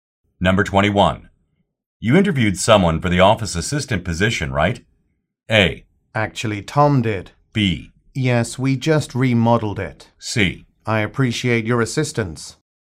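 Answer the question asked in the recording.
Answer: A: Actually, Tom did.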